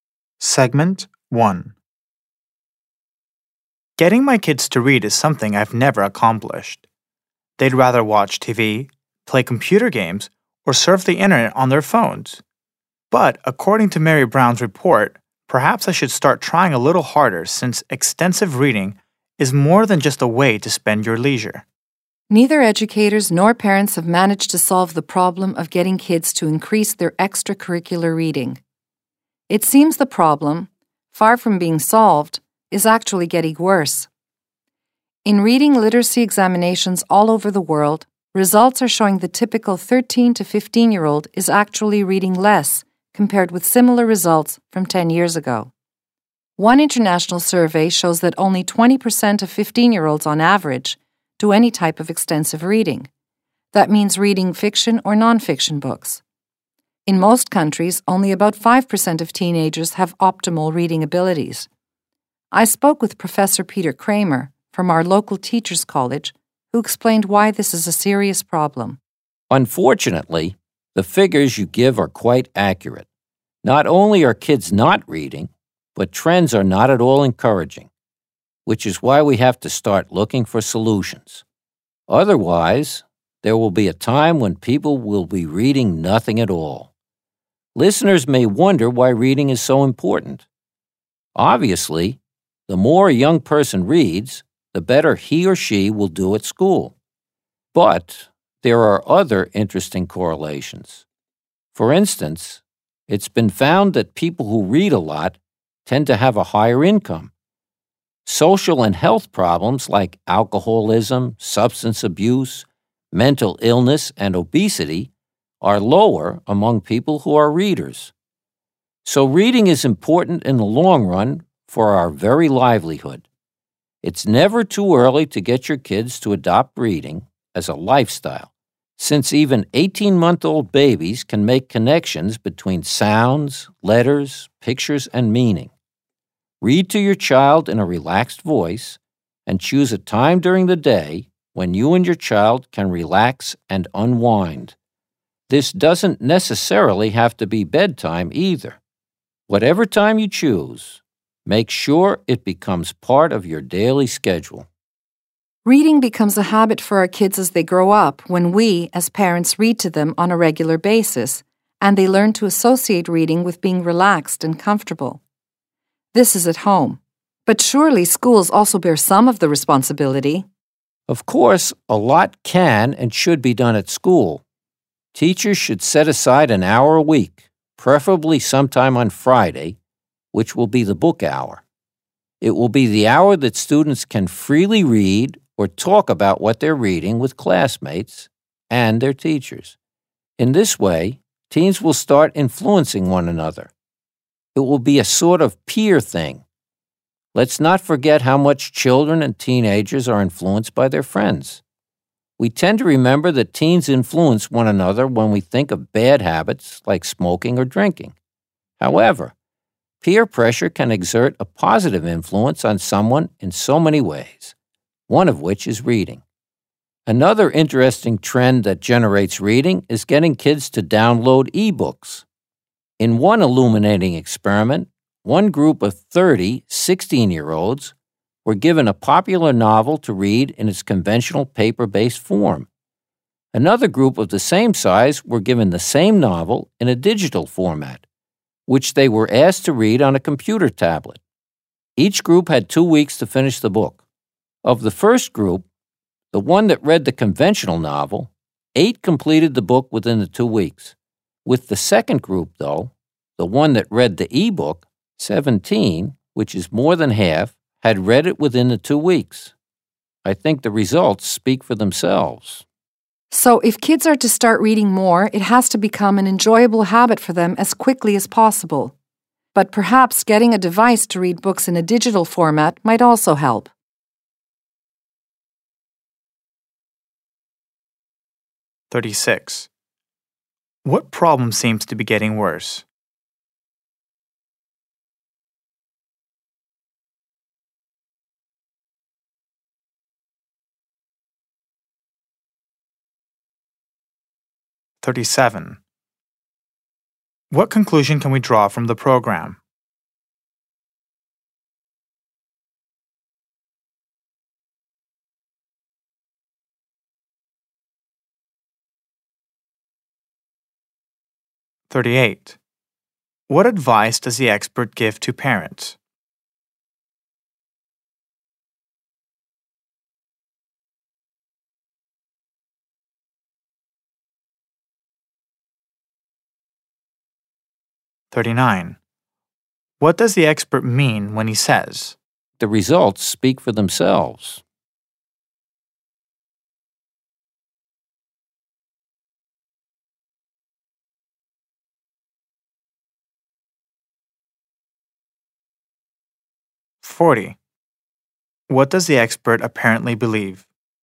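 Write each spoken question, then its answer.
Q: What problem seems to be getting worse?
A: Getting kids to read more outside school: teenagers read less than 10 years ago

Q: What advice does the expert give to parents?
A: Read to your children regularly, every day, at a relaxed time

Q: What does the expert mean when he says?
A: E-books clearly get teenagers to finish more books than paper books do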